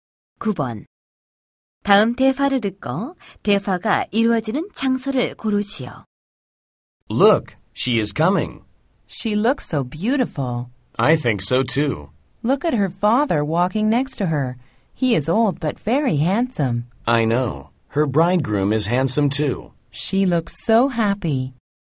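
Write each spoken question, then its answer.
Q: 다음 대화를 듣고 대화가 이루어지는 장소를 고르시오.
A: 결혼식장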